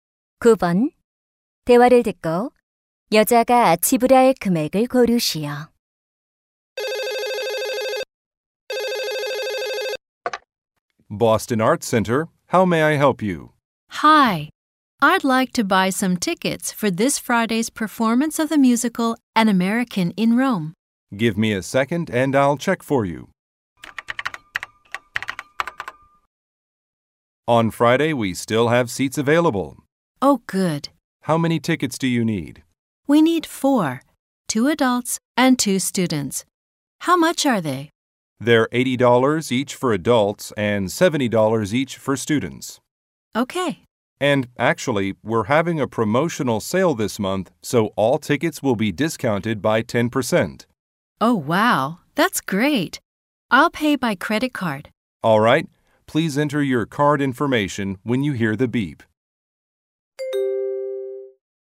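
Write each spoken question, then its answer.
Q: 대화를 듣고 여자가 지불할 금액을 고르시오.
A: $270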